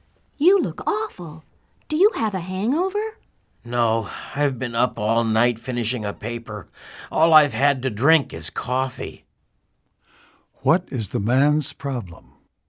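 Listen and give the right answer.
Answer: He stayed up all night finishing a paper and is tired.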